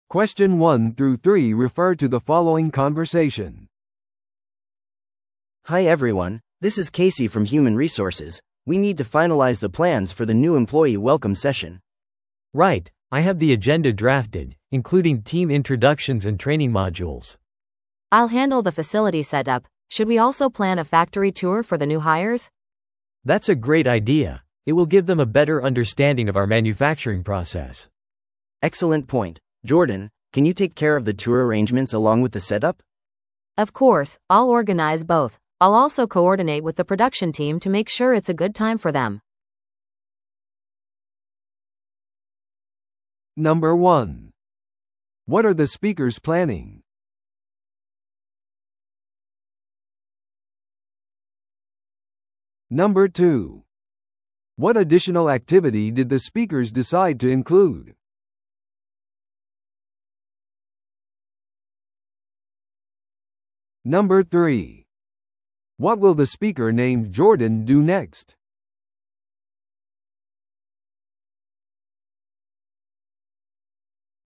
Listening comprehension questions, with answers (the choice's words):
Listen to the audio below and answer the questions.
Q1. What are the speakers planning?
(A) チームビルディングのエクササイズ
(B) 新入社員歓迎セッション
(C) 年次総会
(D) 製品発表会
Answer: 新入社員歓迎セッション

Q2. What additional activity did the speakers decide to include?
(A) 研修セミナー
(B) 会社の夕食会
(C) 個人的な紹介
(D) 工場見学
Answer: 工場見学

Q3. What will the speaker named Jordan do next?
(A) イベントのアジェンダを作成する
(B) 歓迎のスピーチを準備する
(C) 施設設置と工場見学の手配をする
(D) 人事部との調整を行う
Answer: 施設設置と工場見学の手配をする

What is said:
A: Hi everyone, this is Casey from human resources. We need to finalize the plans for the new employee welcome session.
B: Right, I have the agenda drafted, including team introductions and training modules.
C: I'll handle the facility setup. Should we also plan a factory tour for the new hires?
B: That's a great idea! It will give them a better understanding of our manufacturing process.
A: Excellent point. Jordan, can you take care of the tour arrangements along with the setup?
C: Of course, I'll organize both. I'll also coordinate with the production team to make sure it's a good time for them.